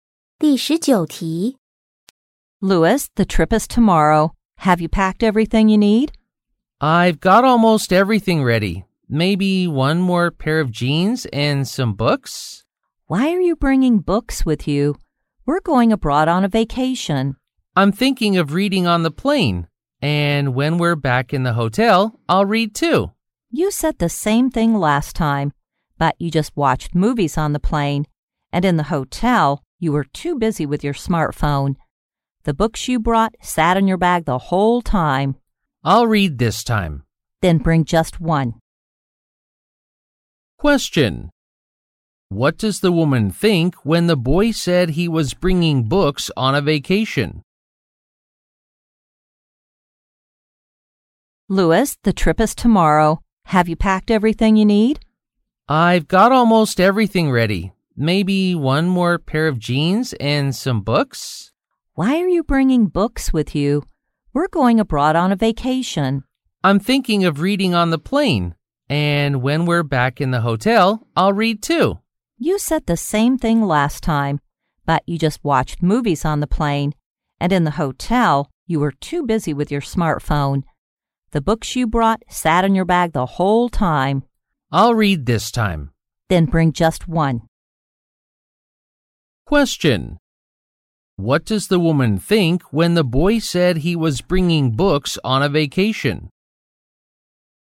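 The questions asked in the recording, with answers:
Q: What does the woman think when the boy said he was bringing books on a vacation?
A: She doubts he will really read them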